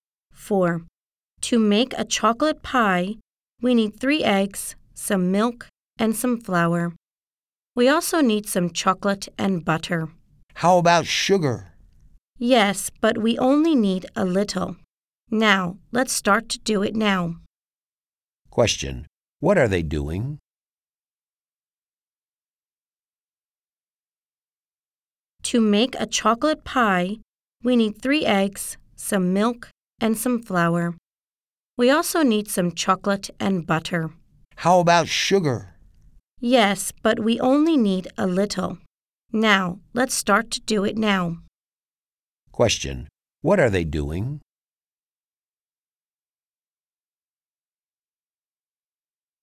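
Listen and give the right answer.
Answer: Making a chocolate pie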